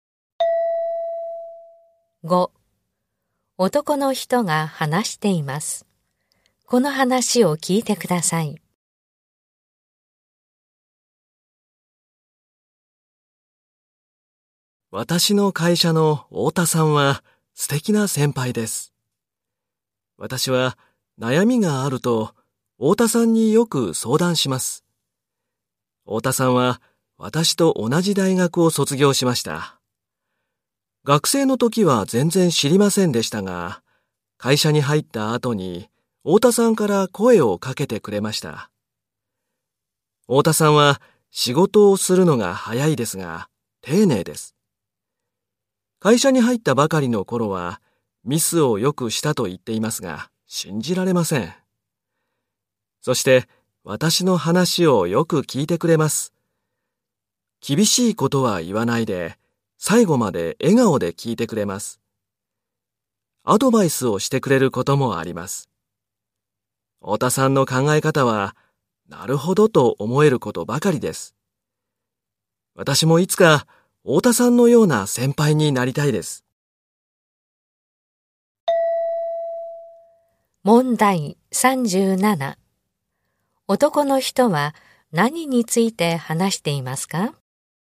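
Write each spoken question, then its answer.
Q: 男の人は何について話していますか?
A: 会社の先輩の太田さん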